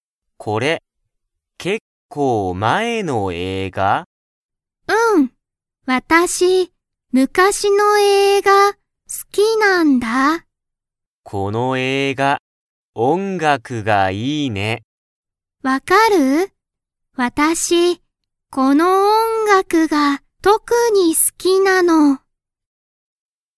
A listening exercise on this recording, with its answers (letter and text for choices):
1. エリは、昔むかしの映画(えいが)が好(す)きですか?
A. はい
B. いいえ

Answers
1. A. はい

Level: Level 1